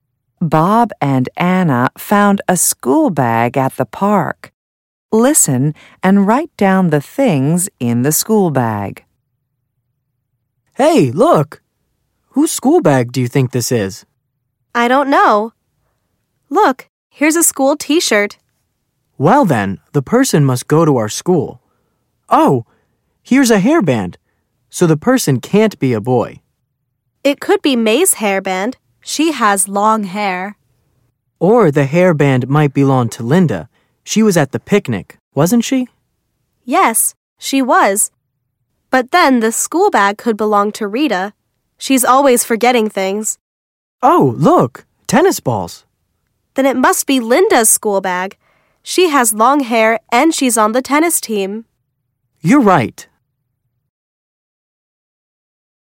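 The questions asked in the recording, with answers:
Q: Listen and write down the things in the school bag.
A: a school t-shirt, a hairband, tennis balls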